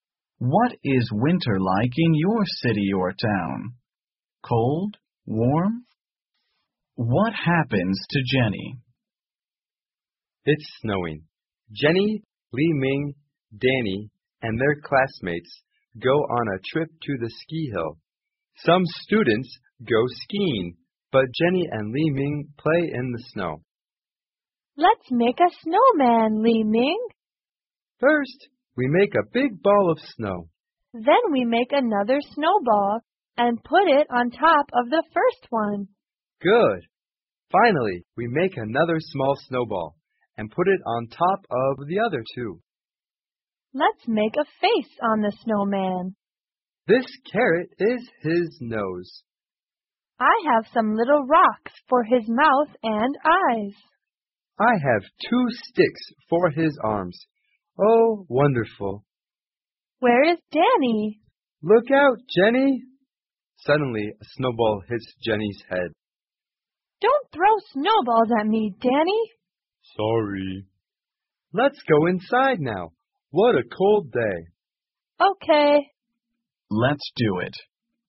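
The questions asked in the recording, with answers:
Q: What happens to Jenny?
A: A snowball hits Jenny's head.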